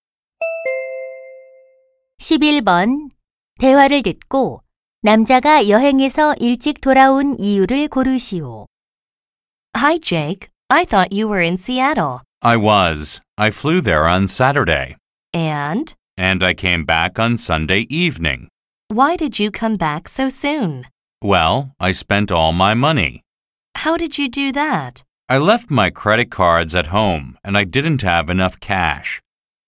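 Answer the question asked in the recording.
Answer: 돈을 다 써 버려서 (신용카드를 두고 가서 현금이 부족해서)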